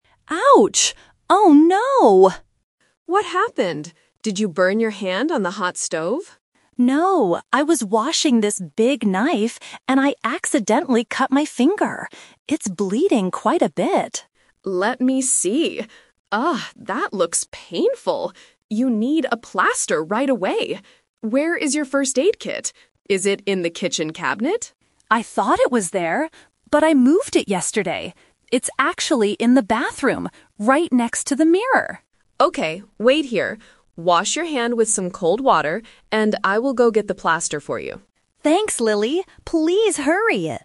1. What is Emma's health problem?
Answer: She cut her finger with a knife.

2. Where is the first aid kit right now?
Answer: In the bathroom.

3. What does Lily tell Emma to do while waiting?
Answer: Wash her hand with cold water.

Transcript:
Emma: Ouch! Oh no!
Lily: What happened? Did you burn your hand on the hot stove?
Emma: No, I was washing this big knife and I accidentally cut my finger. It's bleeding quite a bit.
Lily: Let me see. Oh, that looks painful. You need a plaster right away. Where is your first aid kit? Is it in the kitchen cabinet?
Emma: I thought it was there, but I moved it yesterday. It's actually in the bathroom, right next to the mirror.
Lily: Okay, wait here. Wash your hand with some cold water, and I will go get the plaster for you.